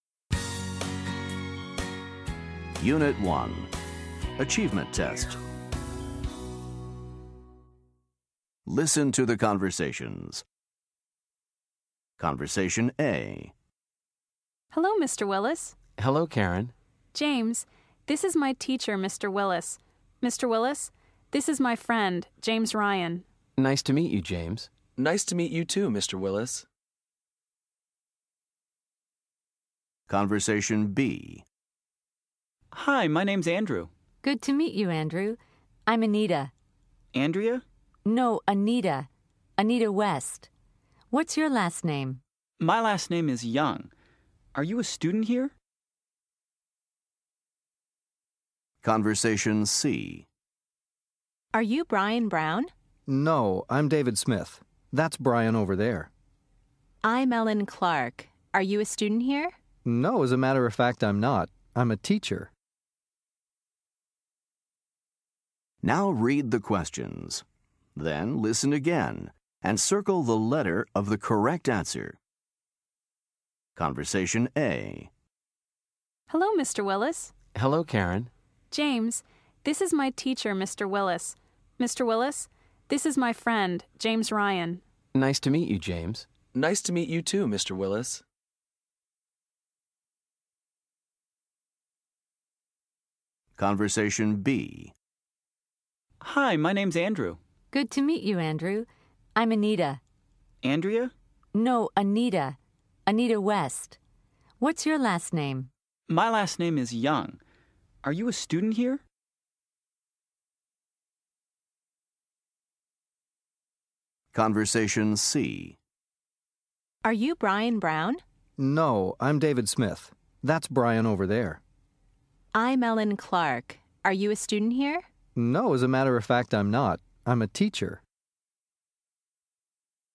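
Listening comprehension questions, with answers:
Listen to the conversations. Then choose the correct answer for each question.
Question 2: Who is James?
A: Karen's friend

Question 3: What is the woman's first name?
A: Anita

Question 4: What is the man's last name?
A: Young

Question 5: What is the woman's last name?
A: Clark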